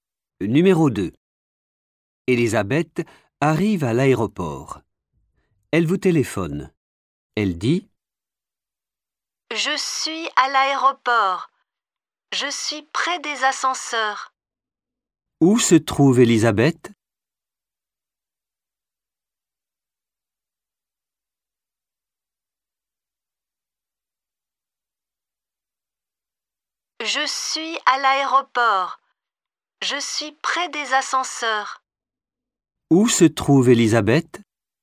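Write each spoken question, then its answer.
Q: Où se trouve Elisabeth ?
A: Près des ascenseurs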